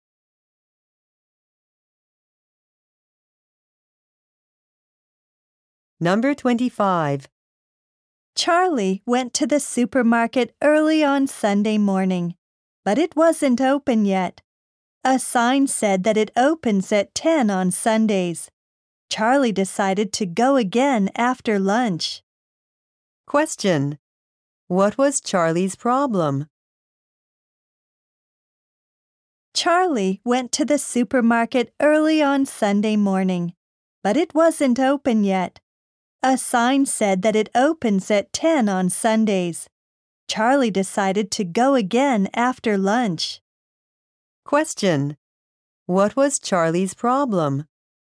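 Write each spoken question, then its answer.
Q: What was Charlie's problem?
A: The supermarket wasn't open yet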